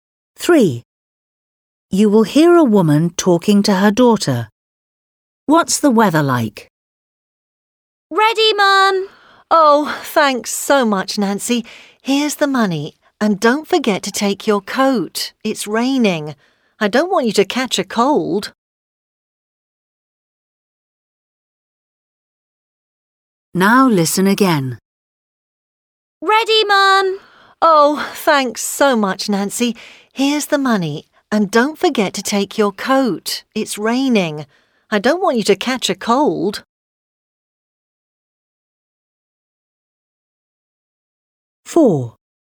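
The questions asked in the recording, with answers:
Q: What's the weather like?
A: it's raining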